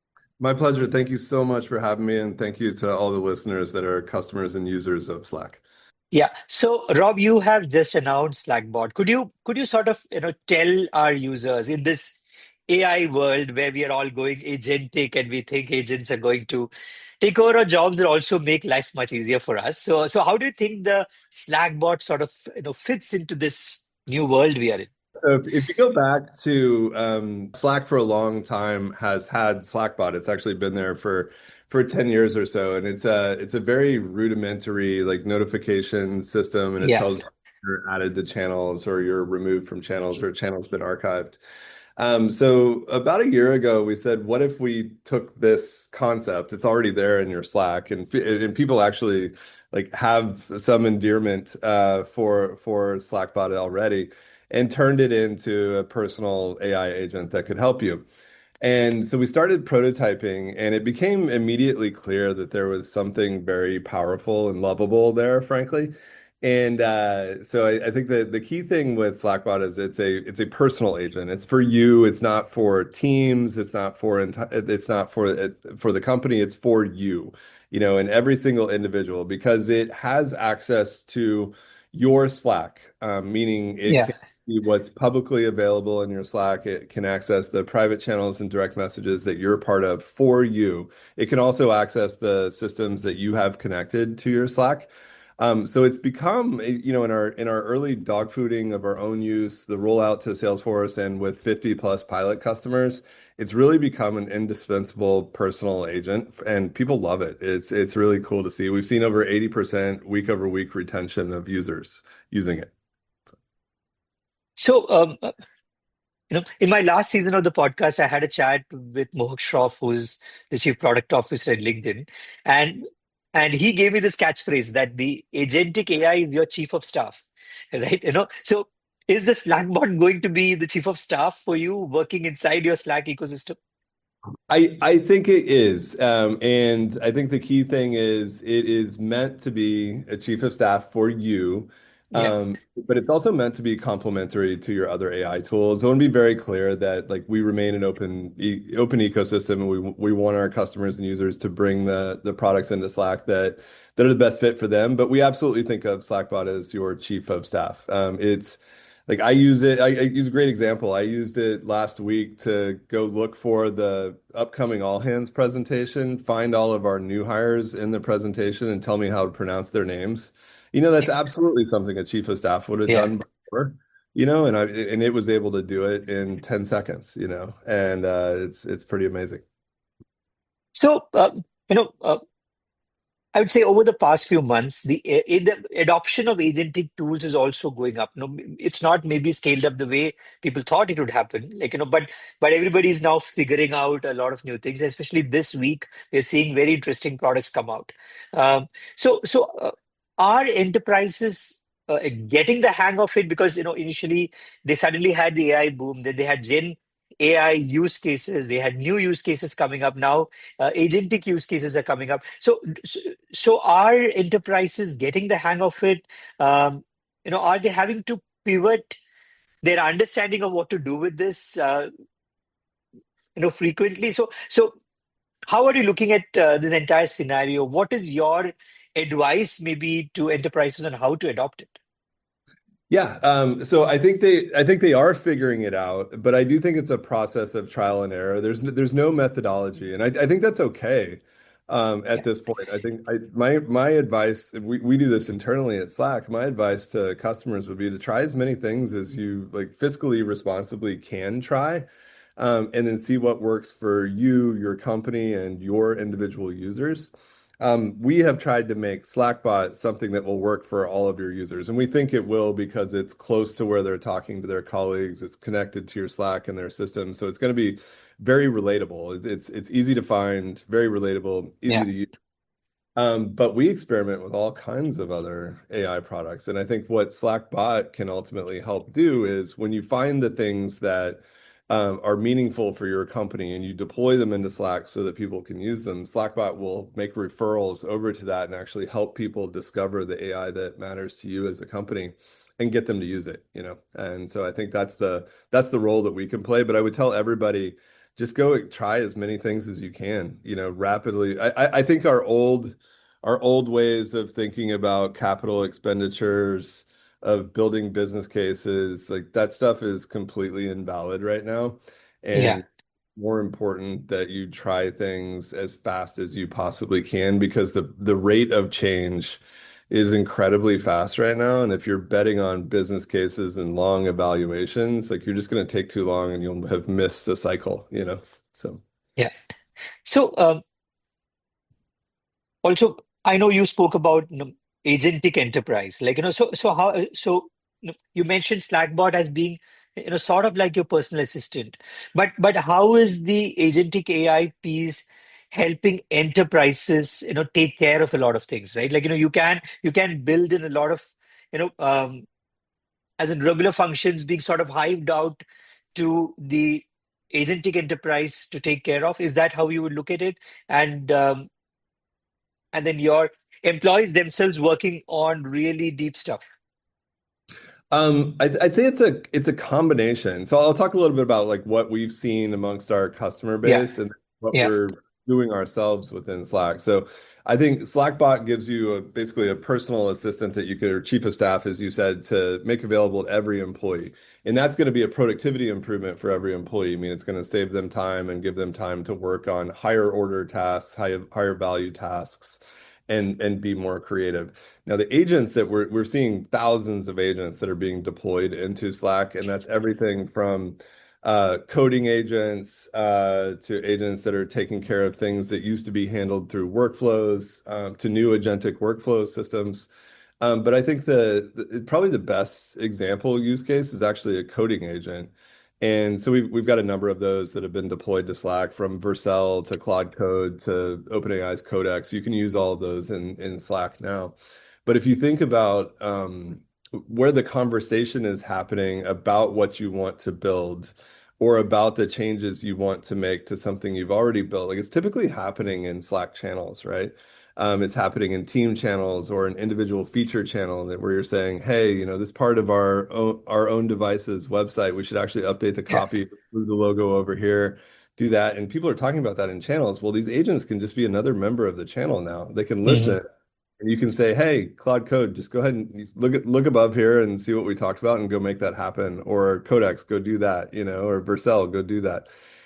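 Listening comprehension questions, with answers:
用 1-2 句话用自己的话回答下面的问题。点「✨ AI 判断」后,AI 会对照当天 transcript 给出参考要点与评分。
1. What was Slackbot originally used for, according to Rob Seaman at the beginning of the interview?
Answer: A basic notification system telling you that you were added to or removed from channels, or that channels were archived.

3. What specific example did Rob Seaman give of using Slackbot himself last week, and how long did it take?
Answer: He had it find the new hires in the upcoming all-hands presentation and tell him how to pronounce their names; it took ten seconds.

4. Name two specific coding agents that Rob Seaman mentioned can be deployed into Slack, and what was his advice to enterprises about adopting AI tools?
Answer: Two of Vercel, Claude Code and OpenAI's Codex; his advice was to try as many things as you responsibly can, as fast as possible, and see what works.

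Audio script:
Uh we are going to talk about a product um which a lot of us use almost every day. We can't we can't live
without it. Uh and it's a product that's evolving in the interesting times that we are in. Uh and we're going to talk about uh Slack and Slackbot which is their new product. It's just been announced. Uh and we have with us Rob Seaman who is the chief product officer and CEO of Slack. So Rob, thanks for being on the show. >> My pleasure. Thank you so much for having me and thank you to all the listeners that are customers and users of Slack. of Slack.
Yeah. So Rob, you have just announced Slackbot. Could you could you sort of you know tell our users in this AI world where we are all going agentic and we think agents are going to take over our jobs and also make life much easier for us. So so how do you think the Slackbot sort of you know fits into this new world we are in? 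So >> if you go back to um Slack for a long time has had Slackbot. it's actually been there for for
10 years or so and it's a it's a very rudimentary like notification system and it tells you're added to channels or you're removed from channels or channels been archived. >> Um so about a year ago we said what if we took this concept it's already there in your Slack and and people actually like have some endearment uh for for Slackbot already and turned it into a personal AI agent that could help you. And so we started prototyping and it became immediately clear that there was something
very powerful and lovable there frankly. And uh so I I think that the key thing with Slackbot is it's a it's a personal agent. It's for you. It's not for teams. It's not for entire it's not for for the company. It's for you, you know, and every single individual because it has access to your Slack. Um meaning it was what's publicly available in your Slack. 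It can access the private channels and direct messages that you're part of for you. It can also access the systems that
you have connected to your Slack. Um, so it's become, you know, in our in our early dog fooding of our own use, the roll out to Salesforce and with 50 plus pilot customers, it's really become an indispensable personal agent and people love it. It's it's really cool to see. We've seen over 80% week-over-week retention of users using it. So um you know in my last season of the podcast I had a chat with Mohawk Shro who's the chief product officer at LinkedIn and and he gave
me this catchphrase that the agentic AI is your chief of staff right you know so is the Slackbot going to be the chief of staff for you working inside your Slack ecosystem ecosystem >> I I think it is um and I think the key thing is it is meant to be a chief of staff for you um but it's also meant to be complimentary to your other AI tools. 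I want to be very clear that like we remain an open open ecosystem and we we want
our customers and users to bring the the products into Slack that that are the best fit for them. But we absolutely think of Slackbot as your chief of staff. Um it's like I use it I I use a great example. I used it last week to go look for the upcoming all hands presentation, find all of our new hires in the presentation and tell me how to pronounce their names. you know that's absolutely something a chief of staff would have done before you know and I
and it was able to do it in 10 seconds you know and uh it's it's pretty amazing amazing >> so you know I would say over the past few months the the adoption of agentic tools is also going up know it's not maybe scaled up the way people thought it would happen like you know but but everybody's now figuring out a lot of new things especially this week we're seeing very interesting products come out um so so Are enterprises getting the hang of it? 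Because you
No, it's not maybe scaled up the way people thought it would happen like, you know, but, but everybody is now figuring out a lot of new things, especially this week.
You're seeing very interesting products come out.
Um, so, so, uh, our enterprises, uh, getting the hang of it because, you know, initially they suddenly had the AI boom, then they had gen AI use cases, they had new use cases coming up.
Now, uh, agentic use cases are coming up.
Um, you know, are they having to pivot their understanding of what to do with this, uh, you know, frequently?
So, so how are you looking at, uh, the entire scenario?
What is your advice maybe to enterprises on how to adopt it?
Yeah.
Um, so I think they, I think they are figuring it out, but I do think it's a process of trial and error.
There's, there's no methodology and I, I think that's okay.
Um, at this point, I think I, my, my advice we, we do this internally at Slack.
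My advice to customers would be to try as many things as you like fiscally, responsibly can try um, and then see what works for you, your company and your individual users.
Um, we have tried to make Slackbot something that will work for all of your users.
And we think it will because it's close to where they're talking to their colleagues.
It's it's easy to find very relatable.
Um, but we experiment with all kinds of other AI products.
And I think what Slackbot can ultimately help do is when you find the things that, um, are meaningful for your company and you deploy them into Slack so that people can use them, Slackbot will make referrals over to that and actually help people discover the AI that matters to you as a company.
And get them to use it, you know, and so I think that's the, that's the role that we can play.
But I would tell everybody, just go try as many things as you can, you know, rapidly.
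I, I, I think our old, our old ways of thinking about capital expenditures, of building business cases like that stuff is completely invalid right now.
Yeah, more important that you try things as fast as you possibly can because the the rate of change is incredibly fast right now.
And if you're betting on business cases and long evaluations, like, you're just gonna take too long and you'll have missed the cycle, you know, so, yeah, so, um, also I know you spoke about, you know, agentic enterprise like, you know.
So so how so you mentioned Slackbot as being, you know, sort of like your personal assistant, but but how is the agentic AI piece helping enterprises, you know, take care of a lot of things, right?
Like, you know, you can you can build in a lot of, you know, um, as in regular functions being sort of hyped out to the agentic enterprise to take care of?
Is that how you would look at it?
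And, um, and then your employees themselves working on really deep stuff?
Um, I'd, I'd say it's a, it's a combination.
So I'll talk a little bit about like what we've seen amongst our customer base and what we're doing ourselves within Slack.
So I think Slackbot gives you a basically a personal assistant that you could or chief of staff as you said to make available every employee.
And that's gonna be a productivity improvement for every employee.
I mean, it's gonna save them time and give them time to work on higher order tasks, higher, higher value tasks and, and be more creative.
Now the agents that we're, we're seeing thousands of agents that are being deployed into Slack and that's everything from, uh, coding agents, uh, to agents that are taking care of things that used to be handled through workflows.
Um to new agentic workflow systems.
Um, but I think the the probably the best example use case is actually a coding agent.
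And so we've, we've got a number of those that have been deployed to Slack from Versal to Claude Code to open AI's Codex.
You can use all of those in in Slack now.
But if you think about um where the conversation is happening about what you want to build or about the changes you want to make to something you've already built.
Like it's typically happening in Slack channels, right?
Um, it's happening in team channels or an individual feature channel that where you're saying, hey, you know, this part of our own, our own devices website, we should actually update the copy through the logo over here.
Do that.
And people are talking about that in channels.
Well, these agents can just be another member of the channel now.
They can listen and you can say, hey, Cloud Code, just go ahead and look at, look above here and see what we talked about and go make that happen or codex, go do that, you know.

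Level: CEFRB2-C1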